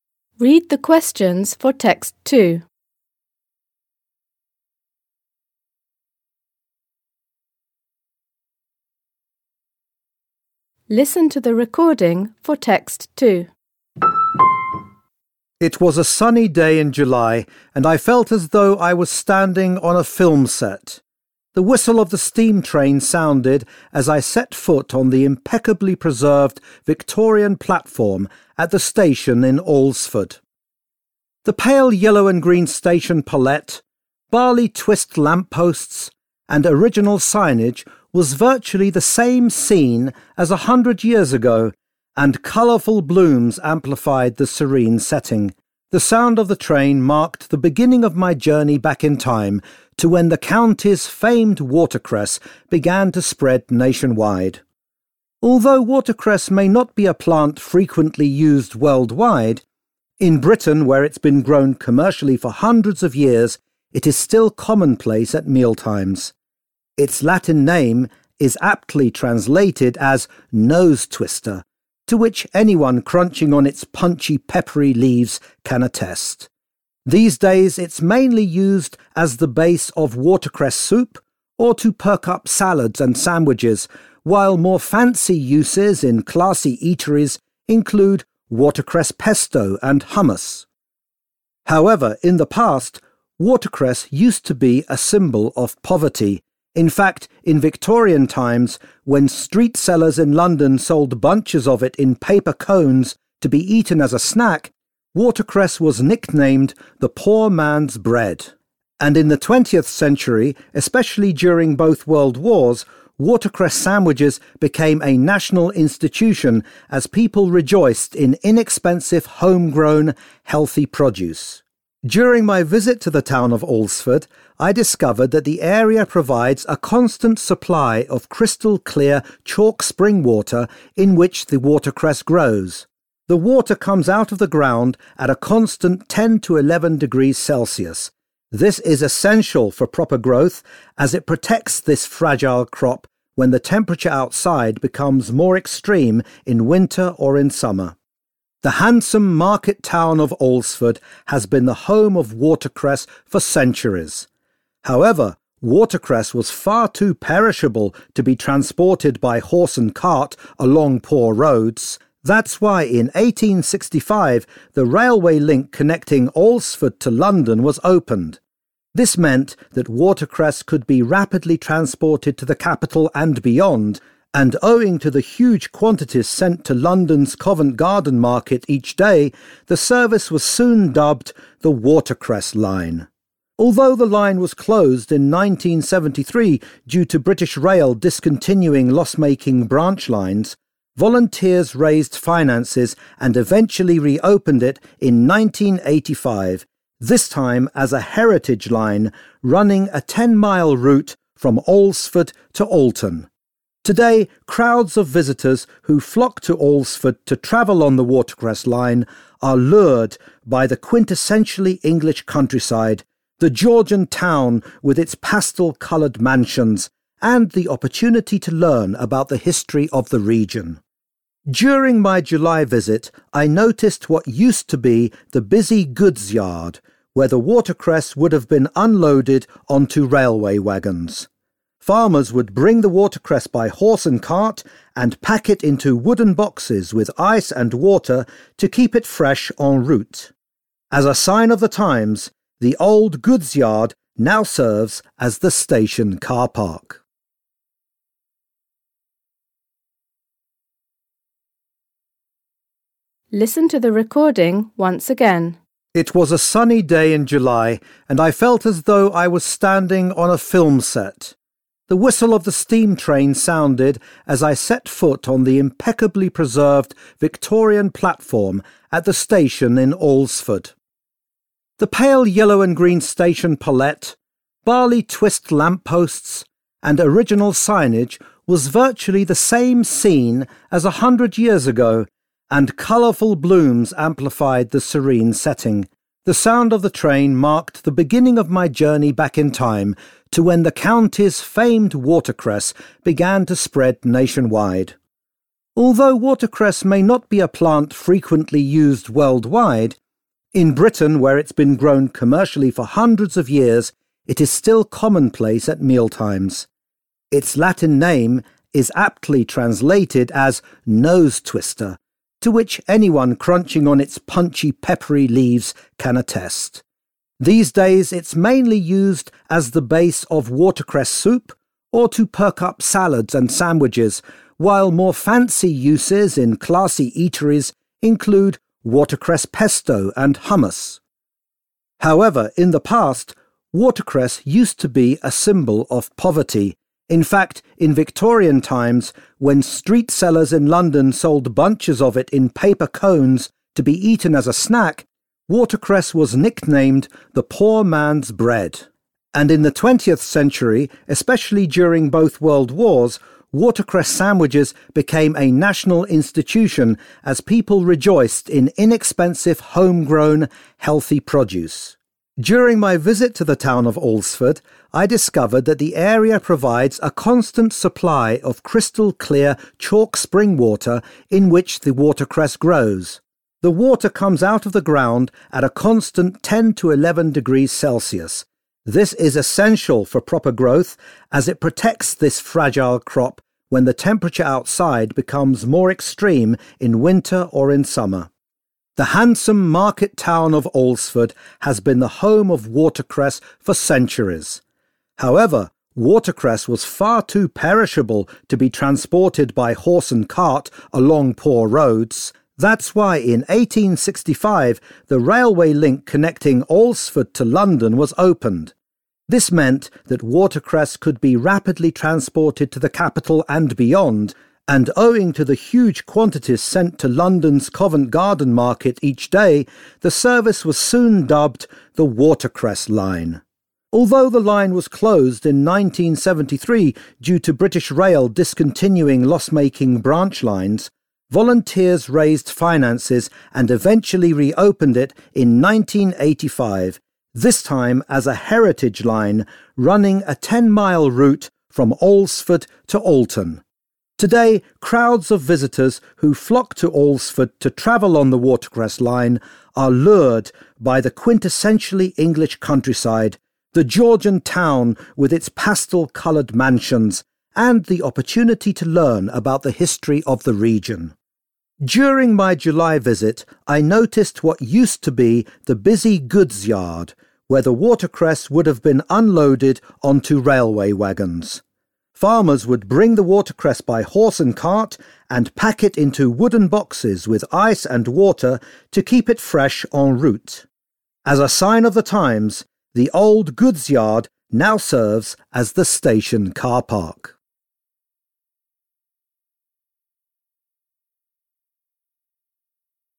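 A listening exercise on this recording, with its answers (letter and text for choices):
For questions 2.1.–2.6., choose the answer which best matches what you have heard by circling the appropriate letter (A, B, C or D). Questions 2.1.–2.3. are for Text 1, questions 2.4.–2.6. are for Text 2. You will hear the recording twice.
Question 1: Based on the description of the station, it can be concluded that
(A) it faithfully captures the spirit of a bygone era.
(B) its architecture was the inspiration for a scene in a film.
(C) it has been considerably altered in the last hundred years.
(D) its peaceful atmosphere stirred up mixed emotions in the speaker.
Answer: (A) it faithfully captures the spirit of a bygone era.

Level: Poziom: dwujęzyczny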